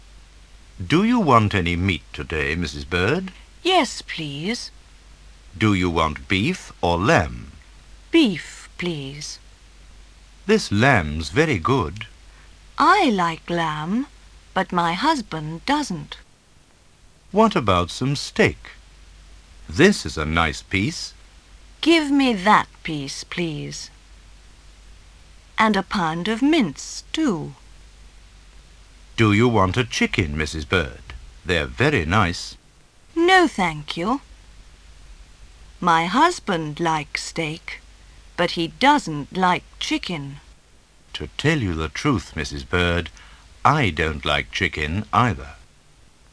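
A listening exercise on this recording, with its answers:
Listen to the dialogue once more and fill in the gaps. Work in pairs.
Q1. Do you want any ____today, Mrs. Bird?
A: meat

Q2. Do you want ___or lamb?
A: beef

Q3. ____, please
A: Beef

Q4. This lamb's ___ ____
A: very good

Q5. Give me that____, please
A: piece

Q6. And a ______ of mince, too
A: pound

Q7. Do you want a _____, Mrs. Bird? They're very nice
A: chicken

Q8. My husband likes ______, but he doesn't like chicken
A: steak

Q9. Who is speaking?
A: A butcher (shop assistant) and Mrs. Bird

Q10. What is the woman's name?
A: Mrs. Bird

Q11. What kind of meat is mentioned in the text?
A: Beef, lamb, steak, mince and chicken

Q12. Why doesn't she want to buy some lamb?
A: Her husband doesn't like lamb

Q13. What else does she want o buy?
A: A pound of mince

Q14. Does she buy a chicken or steak? Why?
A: Steak, because her husband likes steak but doesn't like chicken

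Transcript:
- Do you want any meat today, Mrs. Bird?
- Yes, please
- Do you want beef or lamb?
- Beef, please
- This lamb's very good
- I like lamb, but my husband doesn't
- What about some steak? This is a nice piece
- Give me that piece, please
- And a pound of mince, too
- Do you want a chicken, Mrs. Bird? They're very nice
- No, thank you
- My husband likes steak, but he doesn't like chicken
- To tell you the truth, Mrs. Bird, I don't like chicken either! (Приложение 2)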